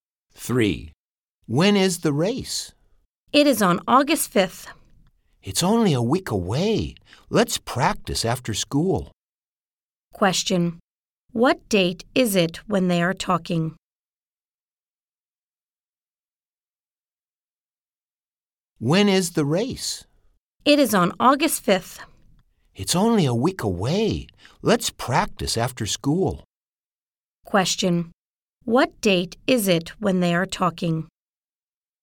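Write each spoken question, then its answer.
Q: Question, what date is it when they are talking?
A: July 29th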